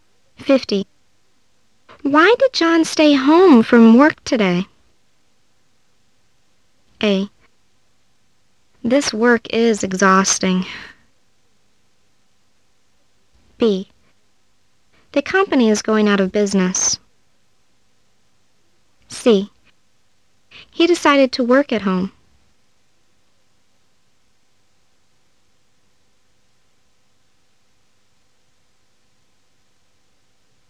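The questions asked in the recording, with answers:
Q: Why did John stay home from work today?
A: C: He decided to work at home.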